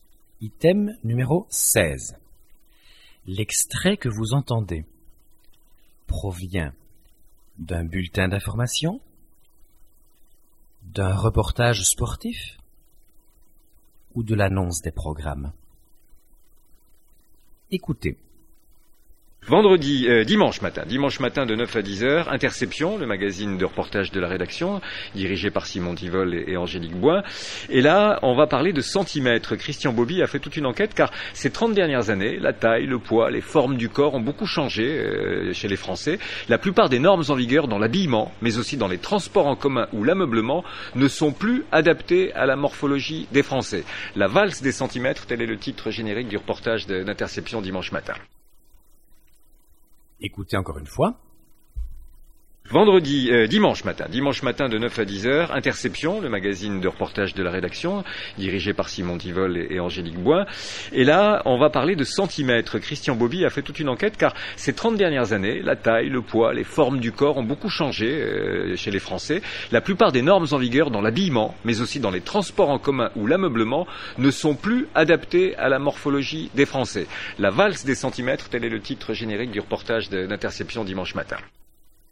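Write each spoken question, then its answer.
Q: L'extrait que vous entendez provient d'un bulletin d'information, d'un reportage sportif ou de l'annonce des programmes.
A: l'annonce des programmes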